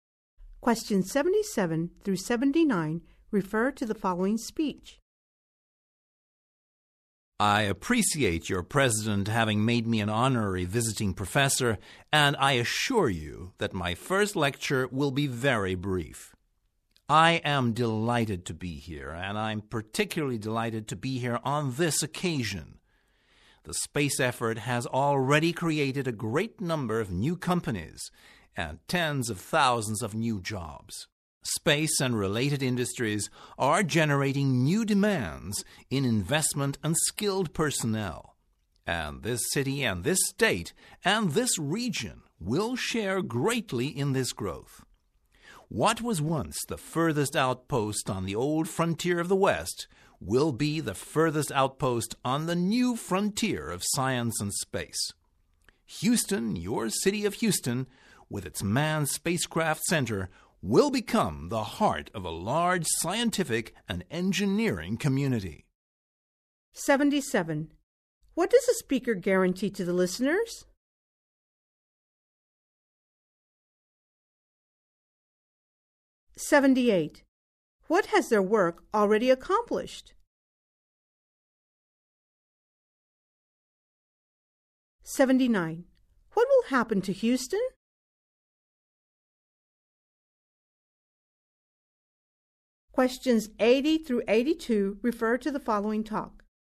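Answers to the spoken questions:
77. His first lecture will be very brief
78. Created many new companies and tens of thousands of jobs
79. It will become the heart of a large scientific and engineering community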